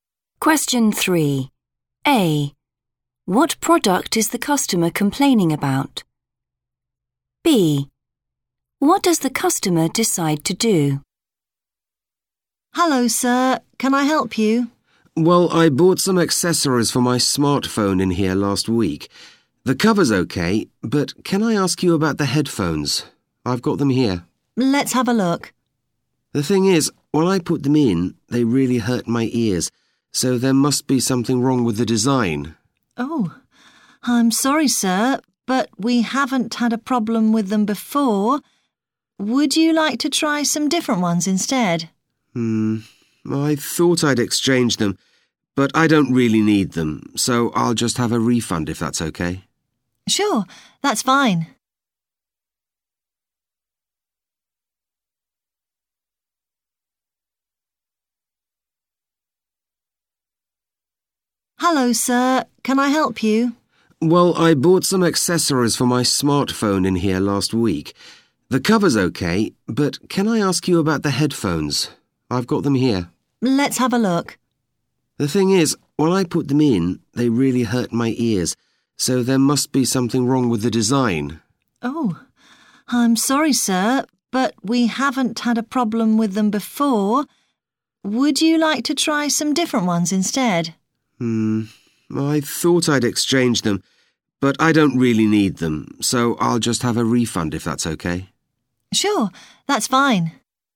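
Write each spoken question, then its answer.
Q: What product is the customer complaining about?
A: Headphones

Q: What does the customer decide to do?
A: Get a refund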